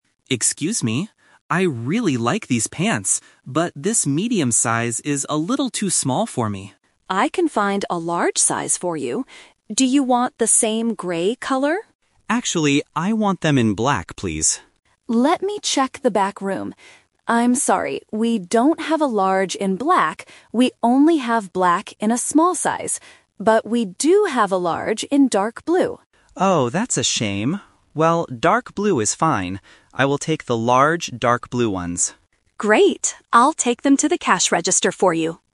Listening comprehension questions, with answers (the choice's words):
Listen to the conversation and choose the correct answer (A, B, or C) for each question.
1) What is the problem with the pants the customer has right now?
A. They are too small.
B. They are too big.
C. They are too expensive.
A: They are too small.

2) What does the customer ask the assistant to find?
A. Medium grey pants.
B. Large black pants.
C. Small black pants.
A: Large black pants.

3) What will the customer buy in the end?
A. Large black pants.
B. Large dark blue pants.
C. Small dark blue pants.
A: Large dark blue pants.

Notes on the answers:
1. In the first line, the customer says, "this medium size is a little too small for me." Why the trap is wrong: Option (B) is the opposite of the truth. Option (C) is a plausible reason to not buy something, but they never talk about the price.
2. The customer needs a bigger size (large) and says, "Actually, I want them in black, please." Why the trap is wrong: Option (A) is the trap because medium grey is what the customer is holding right now, not what he wants to find. Option (C) is the size the store has in stock, not what the customer asked for.
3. This is "The Twist". The store doesn't have large black pants, so the assistant offers dark blue. The customer agrees: "I will take the large dark blue ones." Why the trap is wrong: Option (A) is the trap. The customer wanted them, but the store didn't have them in the back room. Option (C) is a mixed trap using the small size mentioned earlier.

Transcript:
Customer: Excuse me. I really like these pants. But this medium size is a little too small for me.
Assistant: I can find a large size for you. Do you want the same grey color?
Customer: Actually, I want them in black, please.
Assistant: Let me check the back room. I'm sorry. We don't have a large in black. We only have black in a small size. But we do have a large in dark blue.
Customer: Oh, that's a shame. Well, dark blue is fine. I will take the large dark blue ones.